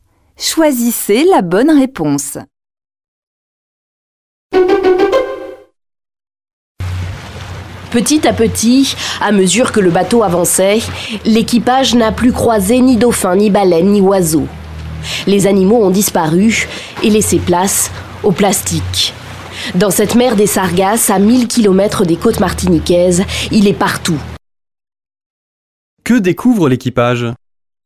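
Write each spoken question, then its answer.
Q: Que découvre l'équipage ?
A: Du plastique partout, à la place des animaux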